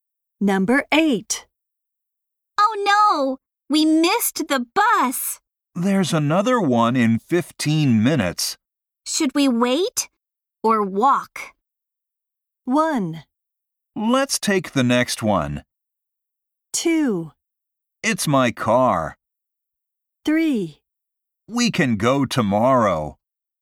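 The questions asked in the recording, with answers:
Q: Should we wait or walk?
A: 1: Let's take the next one.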